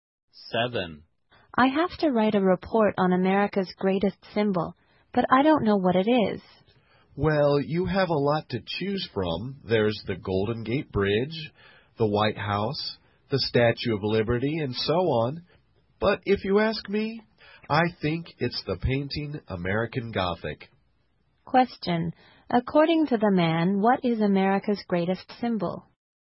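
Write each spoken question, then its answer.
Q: According to the man, what is America's greatest symbol?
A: The painting American Gothic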